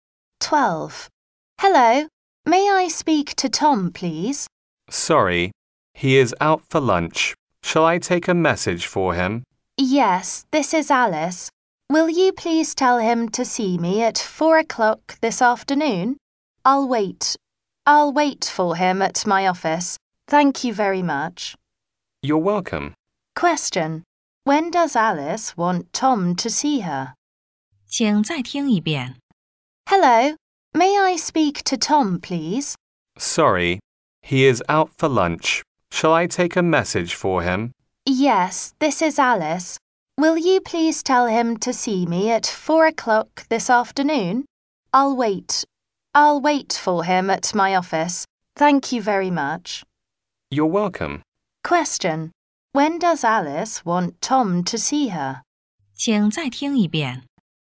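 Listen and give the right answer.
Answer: At 4 o'clock this afternoon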